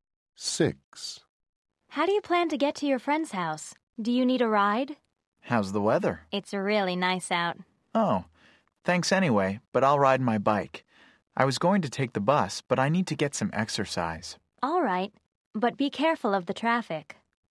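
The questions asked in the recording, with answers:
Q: How do you plan to get to your friend's house?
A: By bike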